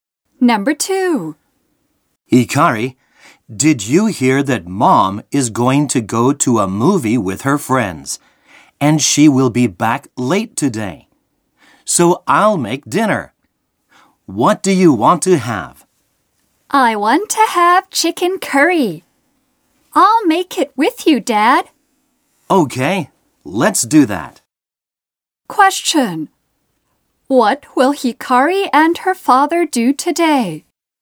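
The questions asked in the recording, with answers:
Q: What will Hikari and her father do today?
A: They will make chicken curry for dinner together.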